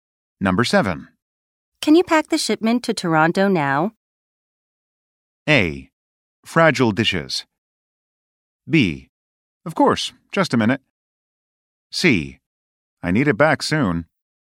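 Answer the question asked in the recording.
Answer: B: Of course, just a minute.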